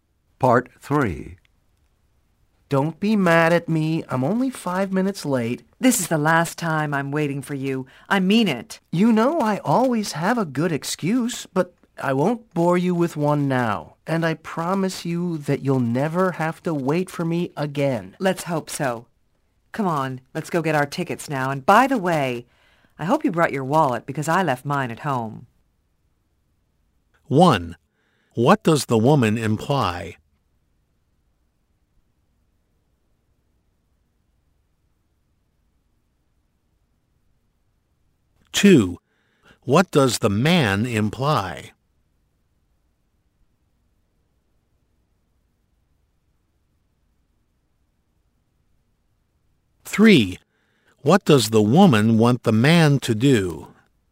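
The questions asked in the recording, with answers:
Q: What does the woman want the man to do?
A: Pay for the tickets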